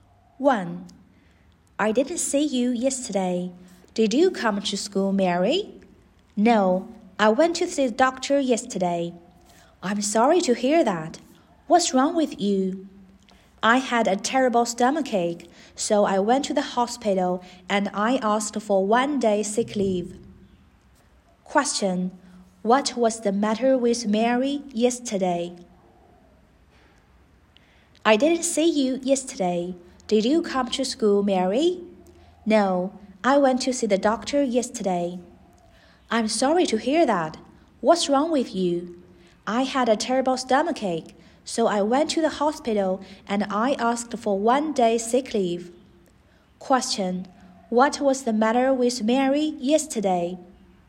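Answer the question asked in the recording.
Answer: She had a terrible stomachache.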